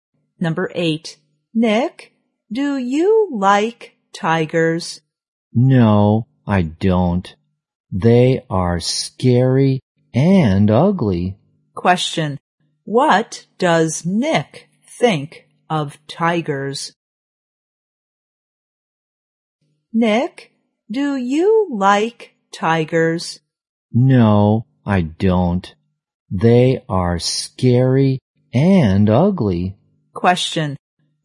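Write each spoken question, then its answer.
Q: Question. What does Nick think of tigers?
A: Scary and ugly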